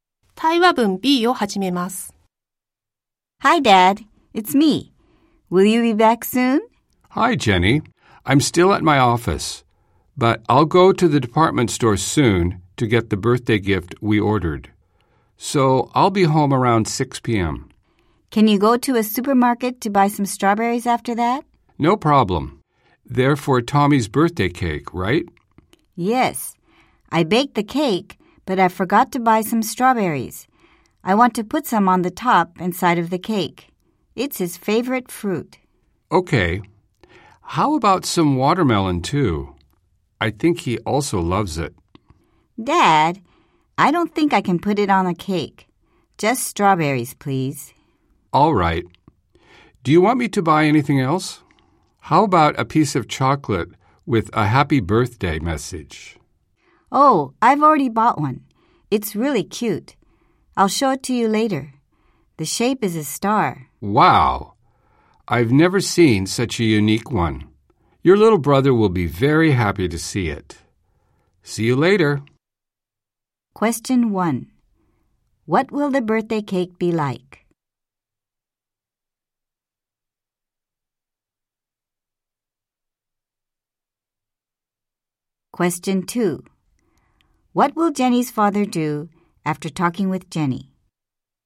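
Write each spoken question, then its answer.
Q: What will the birthday cake be like?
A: Strawberries on the top and side, with a star-shaped chocolate with a birthday message

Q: What will Jenny's father do after talking with Jenny?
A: Go to the department store to get the birthday gift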